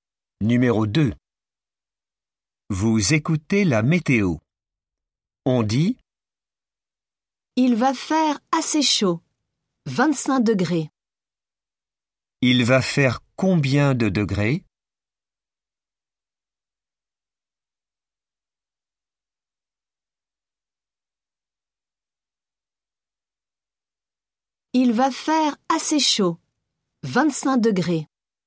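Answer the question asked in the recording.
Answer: 25 degrés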